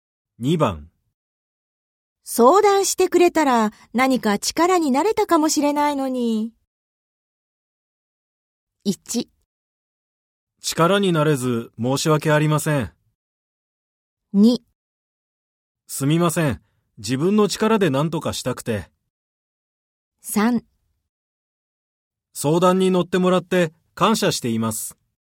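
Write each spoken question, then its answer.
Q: 相談してくれたら何か力になれたかもしれないのに。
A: 2: すみません。自分の力で何とかしたくて。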